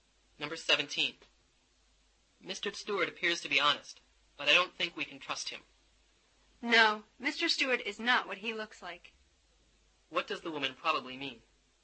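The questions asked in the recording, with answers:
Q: What does the woman probably mean?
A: Mr. Stewart can't be trusted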